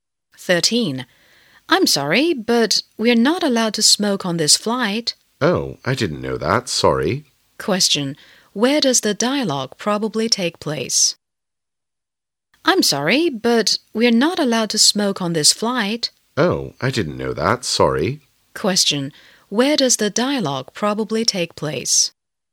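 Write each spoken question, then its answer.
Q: Where does the dialogue probably take place?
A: On a plane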